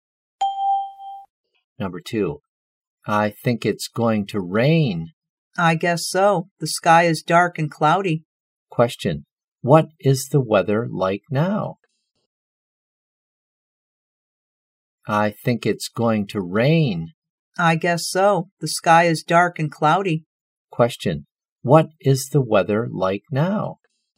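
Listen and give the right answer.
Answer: Dark and cloudy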